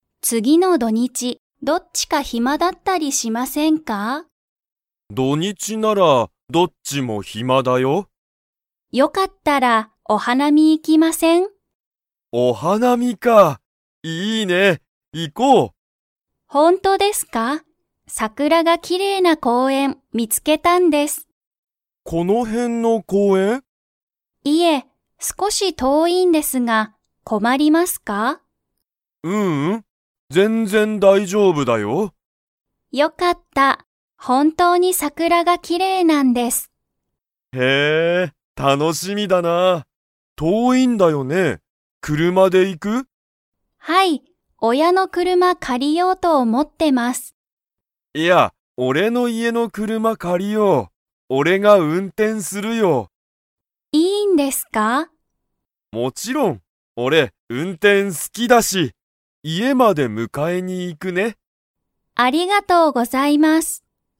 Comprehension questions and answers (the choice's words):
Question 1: はるかは、桜さくらがきれいな を見みつけた。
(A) お店みせ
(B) 土日どにち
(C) 車くるま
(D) 公園こうえん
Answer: 公園こうえん

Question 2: けいごは運転うんてんが好すきですか?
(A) はい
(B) いいえ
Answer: はい

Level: Level 4